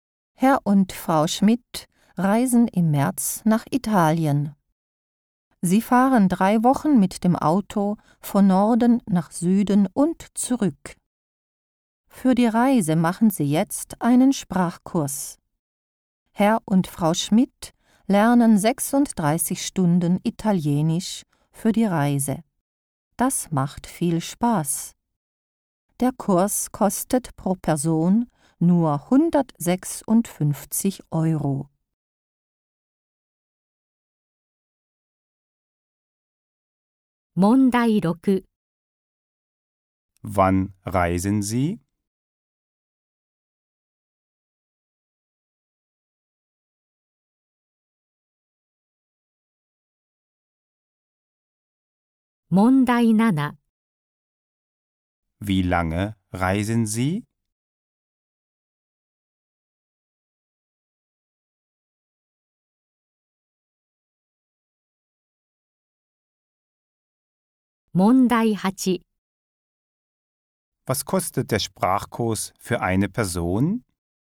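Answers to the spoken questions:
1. Im März
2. 3 Wochen
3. 156 Euro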